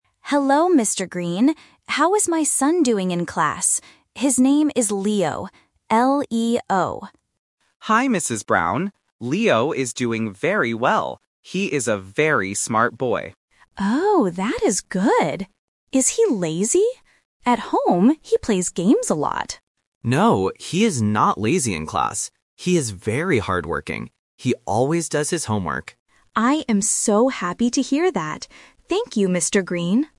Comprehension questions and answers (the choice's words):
Listen to the conversation and circle the correct answer for each question.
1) What is the boy's name?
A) Leon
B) Leo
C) Lee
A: Leo

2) How does the teacher describe the boy in class?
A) Smart and hard-working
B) Smart and lazy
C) Funny and loud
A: Smart and hard-working

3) How does the mother feel at the end of the conversation?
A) Happy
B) Sad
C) Angry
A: Happy

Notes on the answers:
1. The correct answer is (B). The mother spells her son's name clearly: "L-E-O." Options (A) "Leon" and (C) "Lee" are sound traps because they sound very similar to "Leo."
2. The correct answer is (A). The teacher says, "He is a very smart boy," and later adds, "He is very hard-working." Option (B) "Smart and lazy" is a trap; the mother asks if he is lazy, but the teacher says, "No, he is not lazy." Option (C) "Funny and loud" is never mentioned.
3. The correct answer is (A). The mother explicitly says, "I am so happy to hear that." Options (B) "Sad" and (C) "Angry" are not mentioned in the audio.

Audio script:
Parent: Hello, Mr. Green. How is my son doing in class? His name is Leo. L-E-O.
Teacher: Hi, Mrs. Brown. Leo is doing very well. He is a very smart boy.
Parent: Oh, that is good. Is he lazy? At home, he plays games a lot.
Teacher: No, he is not lazy in class. He is very hard-working. He always does his homework.

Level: A1